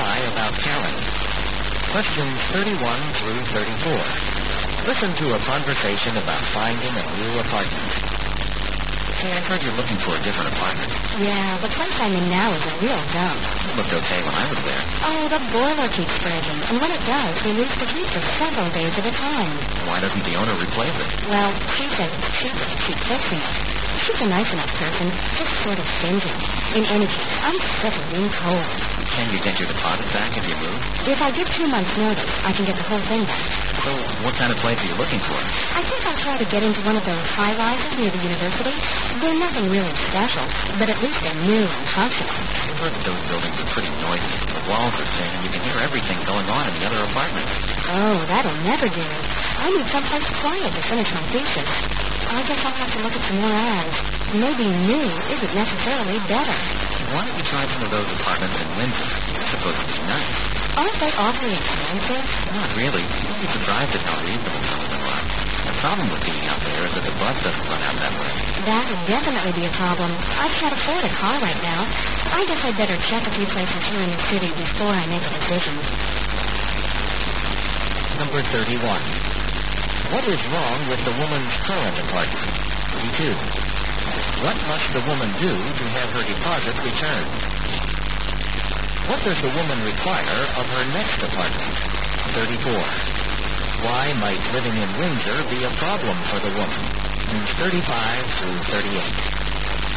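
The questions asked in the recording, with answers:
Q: What is wrong with the woman's current apartment?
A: The boiler keeps breaking, so there's no heat

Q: What must the woman do to have her deposit returned?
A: Give two months' notice

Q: What does the woman require of her next apartment?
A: It must be quiet

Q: Why might living in Windsor be a problem for the woman?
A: The bus doesn't go there and she has no car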